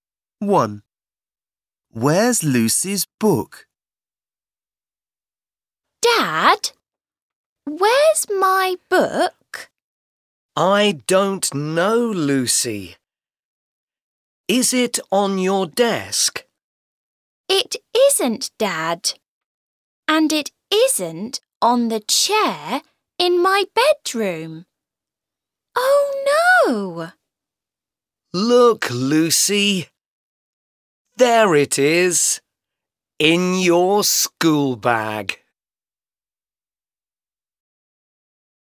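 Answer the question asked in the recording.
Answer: In her school bag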